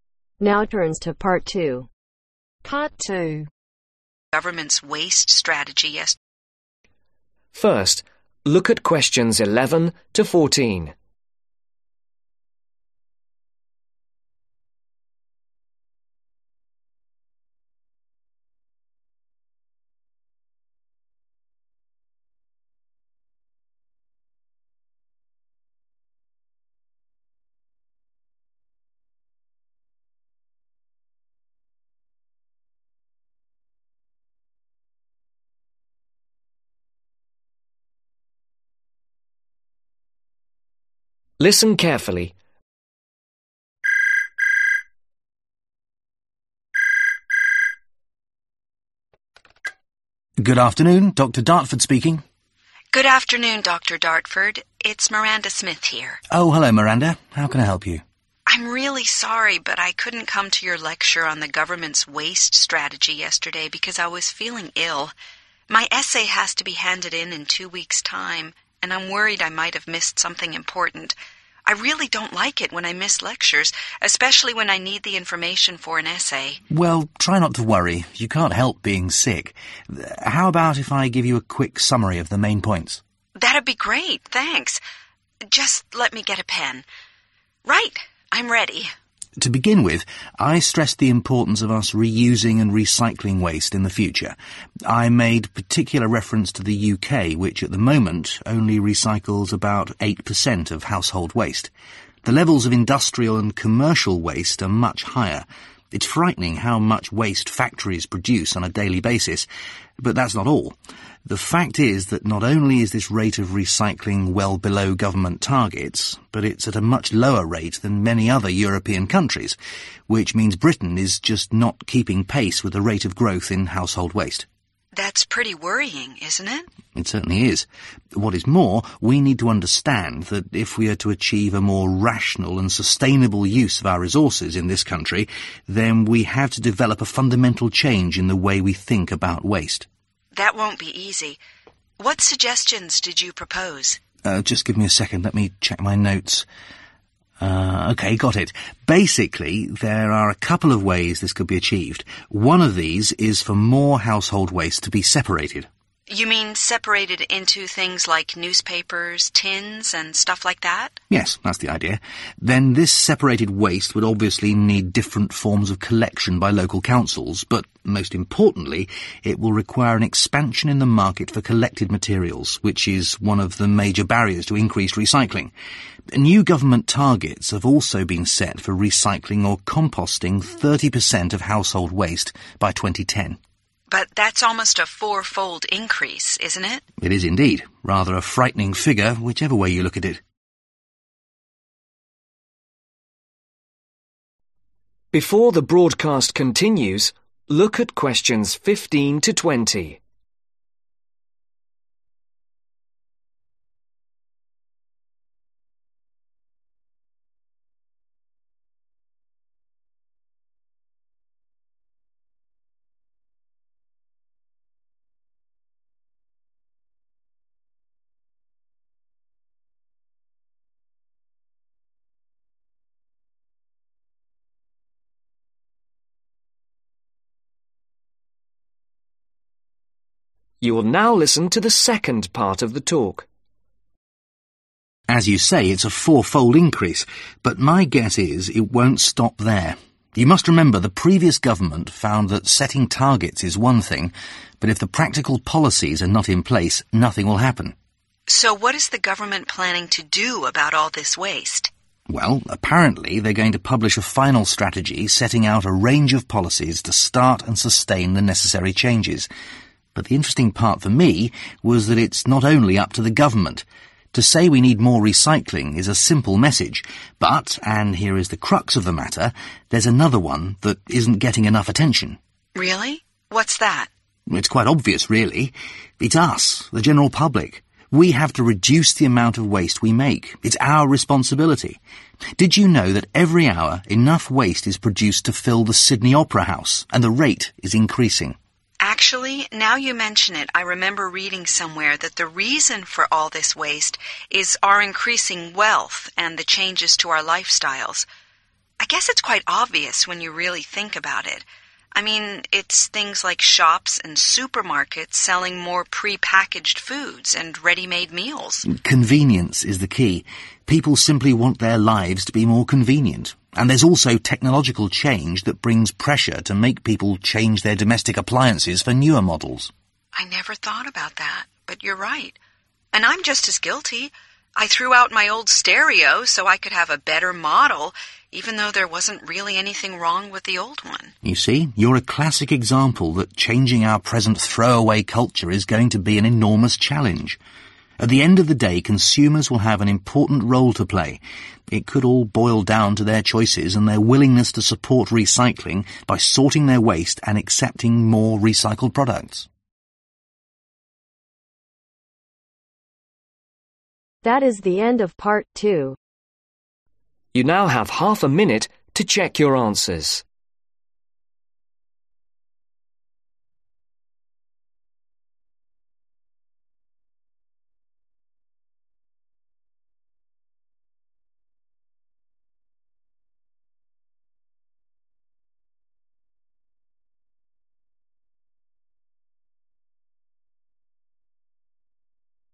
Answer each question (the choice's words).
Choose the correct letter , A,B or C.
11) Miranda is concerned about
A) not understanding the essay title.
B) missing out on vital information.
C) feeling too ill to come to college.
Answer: missing out on vital information.

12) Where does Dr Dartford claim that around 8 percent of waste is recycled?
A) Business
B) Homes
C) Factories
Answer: Homes

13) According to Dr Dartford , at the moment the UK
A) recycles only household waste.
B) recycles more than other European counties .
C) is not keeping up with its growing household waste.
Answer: is not keeping up with its growing household waste.

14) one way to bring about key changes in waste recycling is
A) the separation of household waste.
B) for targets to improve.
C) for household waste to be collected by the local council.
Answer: the separation of household waste.

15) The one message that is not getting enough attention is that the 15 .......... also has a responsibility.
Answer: GENERAL PUBLIC

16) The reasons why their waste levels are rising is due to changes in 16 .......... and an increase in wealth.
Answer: LIFESTYLE

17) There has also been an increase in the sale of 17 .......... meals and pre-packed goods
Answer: READY MADE

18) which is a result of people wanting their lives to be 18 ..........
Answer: MORE CONVENIENT

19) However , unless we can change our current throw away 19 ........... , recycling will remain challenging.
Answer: CULTURE

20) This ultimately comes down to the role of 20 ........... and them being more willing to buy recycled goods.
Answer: CONSUMERS